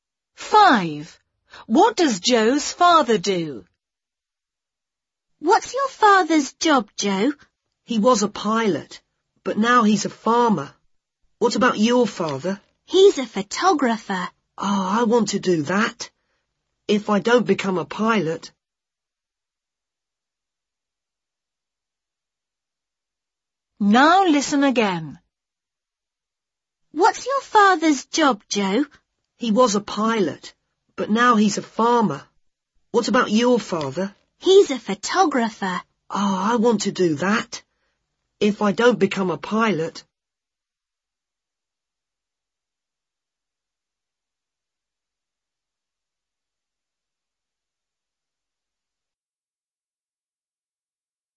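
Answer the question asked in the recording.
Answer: He's a farmer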